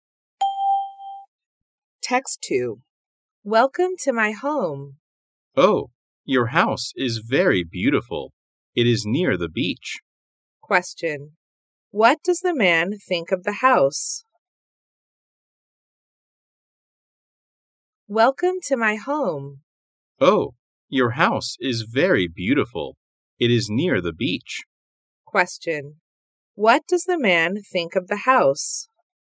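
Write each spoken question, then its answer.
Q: What does the man think of the house?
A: It is very beautiful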